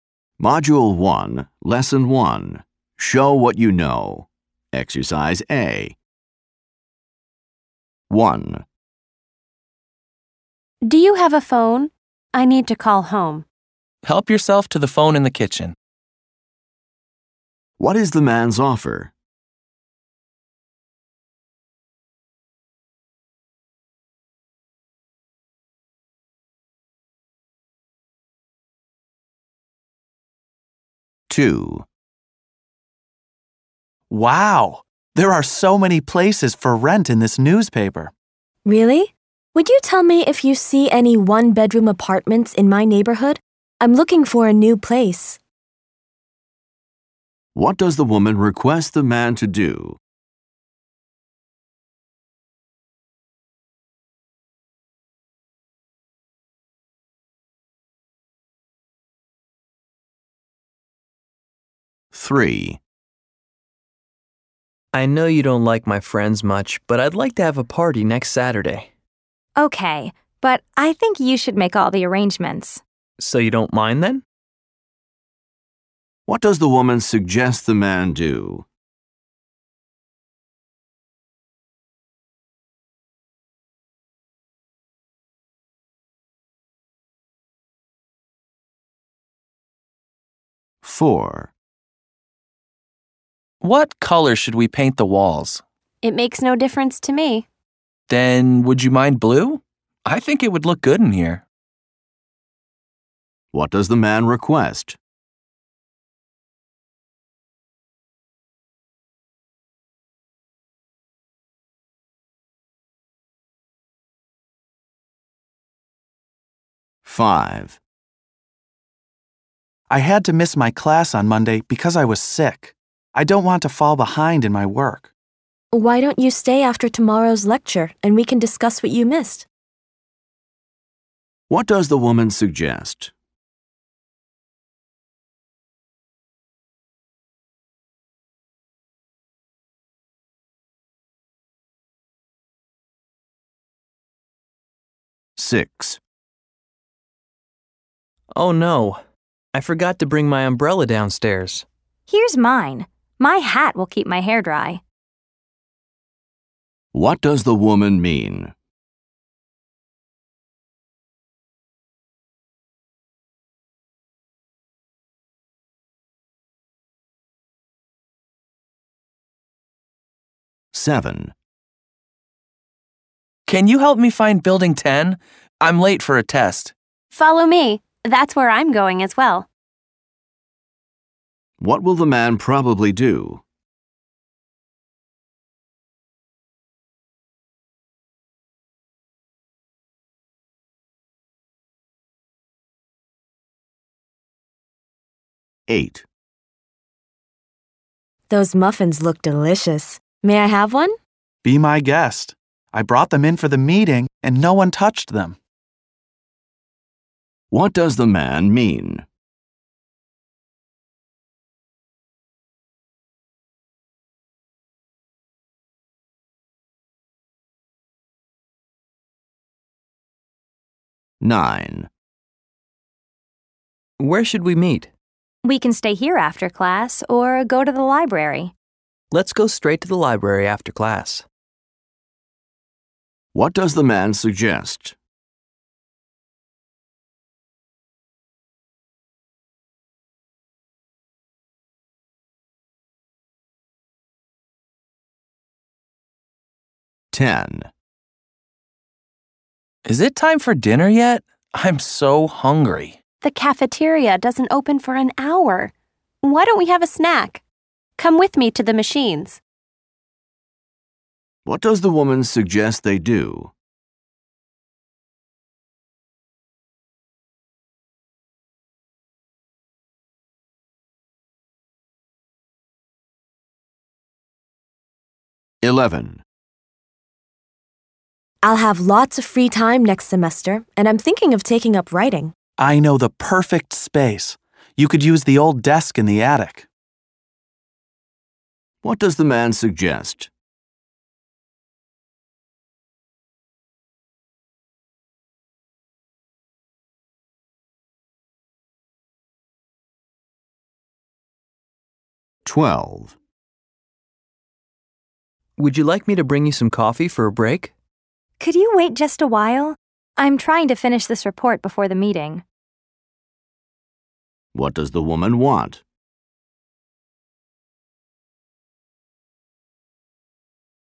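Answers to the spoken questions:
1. He offers to let her use the phone in the kitchen.
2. Tell her if he sees any one-bedroom apartments in her neighborhood.
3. Make all the arrangements for the party himself.
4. That they paint the walls blue.
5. Stay after tomorrow's lecture to discuss what he missed.
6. The man can use her umbrella; her hat will keep her dry.
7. Take the woman to Building 10.
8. She is welcome to take a muffin.
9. Going straight to the library after class.
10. Get a snack from the machines.
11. Using the old desk in the attic for writing.
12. To finish her report before having coffee.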